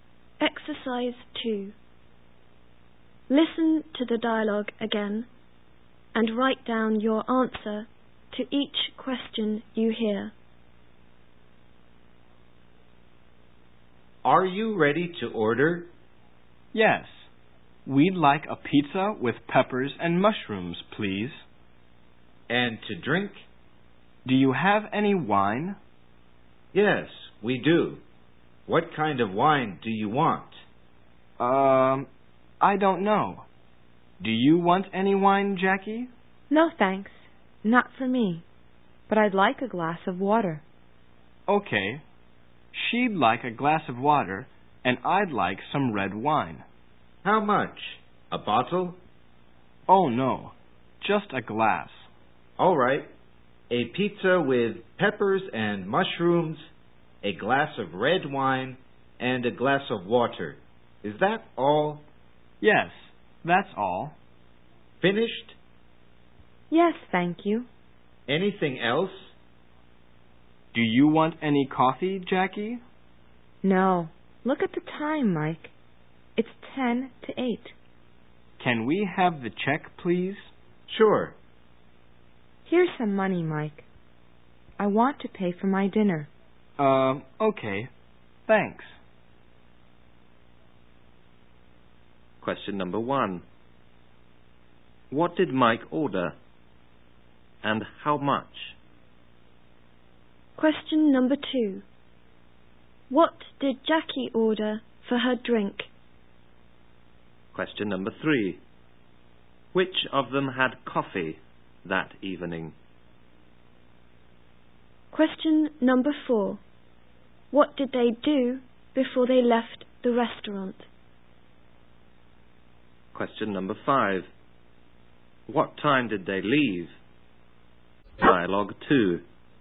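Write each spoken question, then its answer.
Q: What did Mike order? And how much?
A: A pizza with peppers and mushrooms and some red wine, just one glass

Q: What did Jackie order for her drink?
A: A glass of water

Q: Which of them had coffee that evening?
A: Neither of them

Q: What did they do before they left the restaurant?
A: They asked for the check and paid

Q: What time did they leave?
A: At about ten to eight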